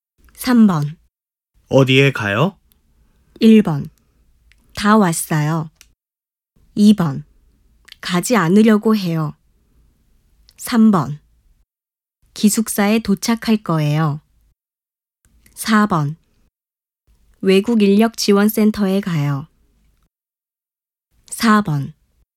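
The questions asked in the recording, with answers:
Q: 어디에 가요?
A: 4: 외국인력지원센터에 가요.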